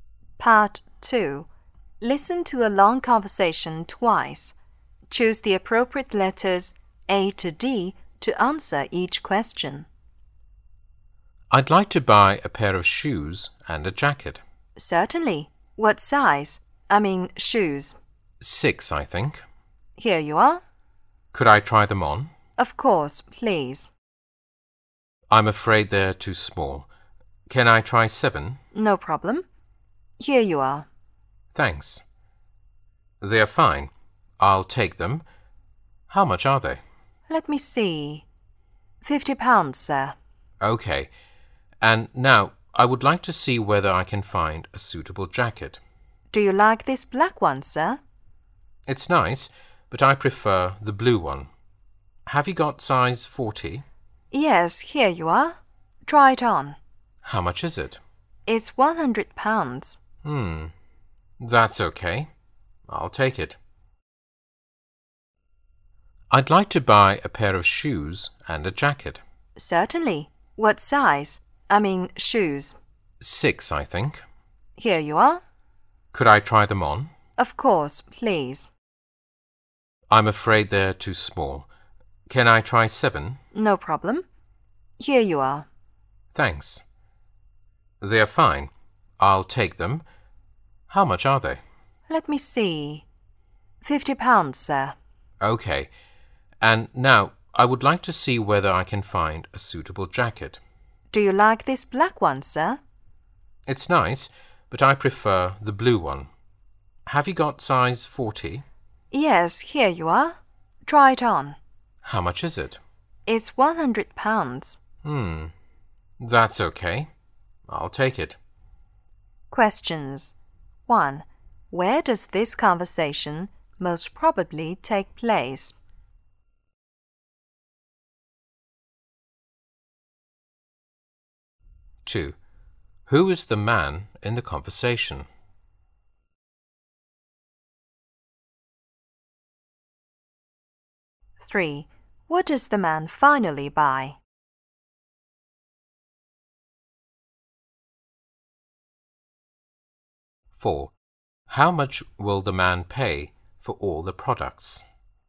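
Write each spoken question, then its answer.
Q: Where does this conversation most probably take place?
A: In a clothes shop

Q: Who is the man in the conversation?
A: A customer

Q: What does the man finally buy?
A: A pair of shoes (size 7) and a blue jacket

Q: How much will the man pay for all the products?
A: £150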